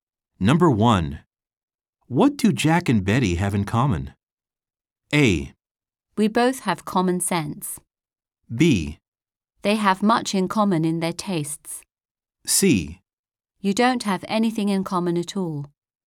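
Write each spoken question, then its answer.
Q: What do Jack and Betty have in common?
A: B: They have much in common in their tastes.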